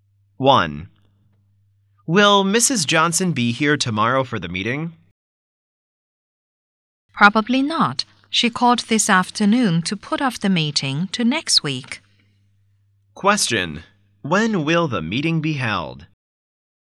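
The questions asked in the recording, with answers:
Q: When will the meeting be held?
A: Next week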